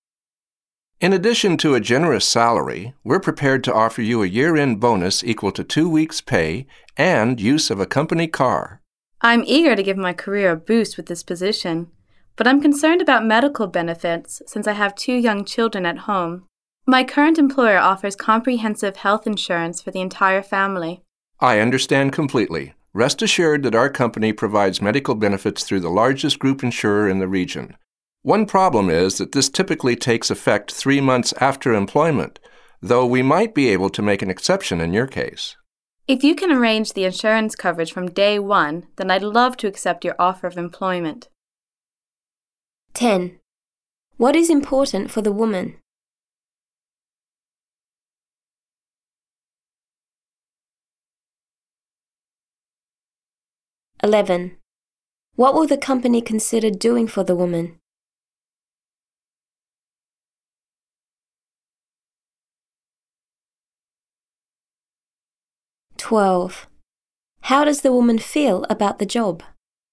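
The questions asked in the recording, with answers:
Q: What is important for the woman?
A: Medical benefits (health insurance) for her family

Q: What will the company consider doing for the woman?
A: Making an exception so her insurance starts from day one instead of after 3 months

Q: How does the woman feel about the job?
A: She is eager to take it, provided insurance covers her from day one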